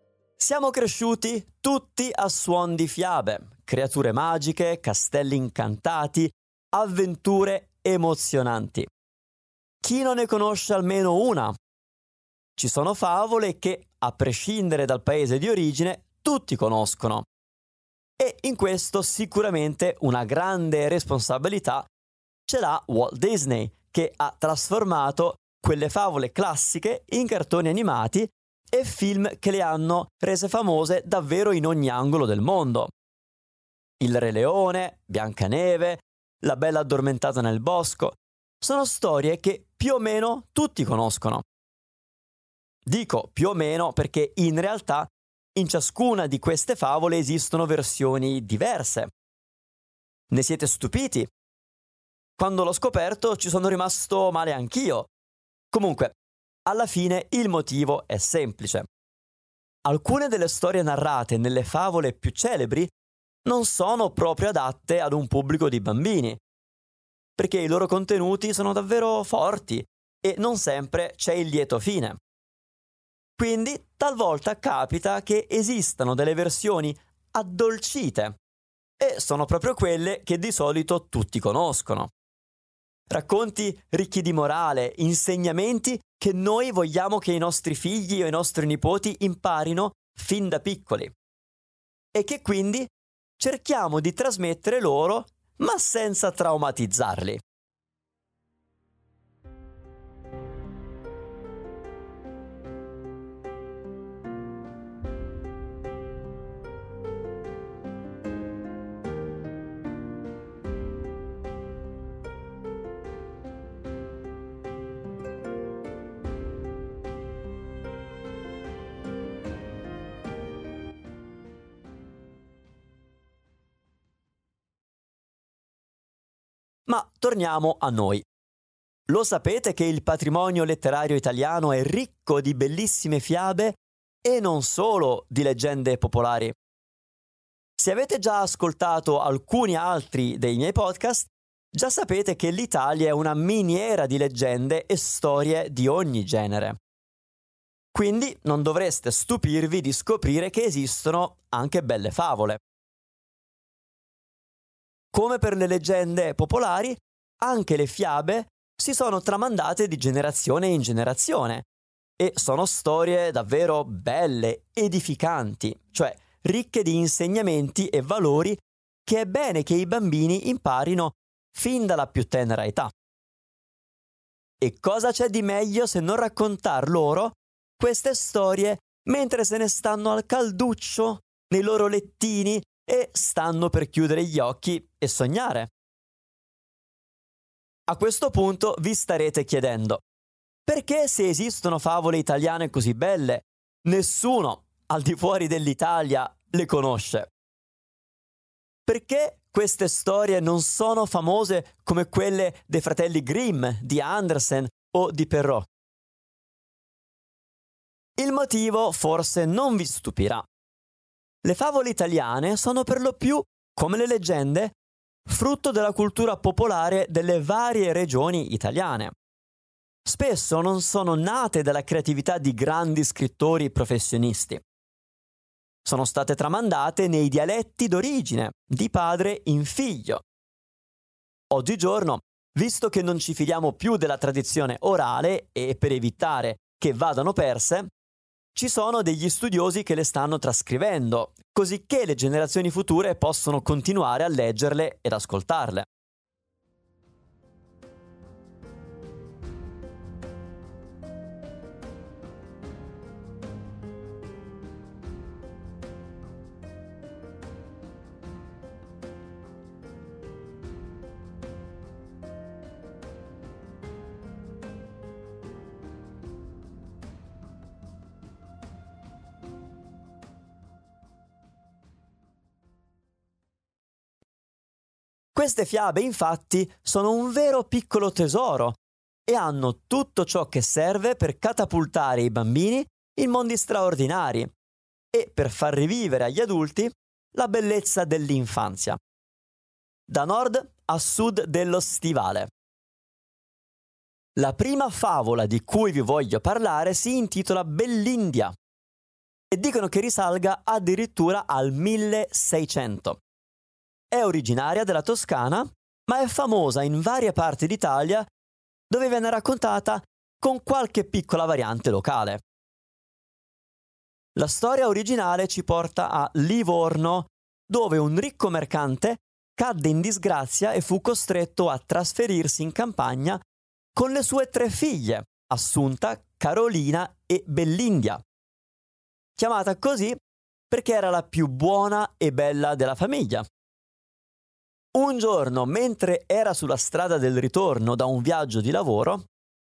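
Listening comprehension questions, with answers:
Here are your TRUE/ FALSE Comprehension questions.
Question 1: Molte favole sono famose grazie a Walt Disney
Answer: Vero

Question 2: Le favole più famose hanno un'unica versione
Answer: Falso

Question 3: La favole italiane sono frutto della cultura popolare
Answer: Vero

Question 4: Bellindia è una favola conosciuta solo in Toscana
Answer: Falso

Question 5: La protagonista di Bellindia è la figlia di un contadino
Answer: Falso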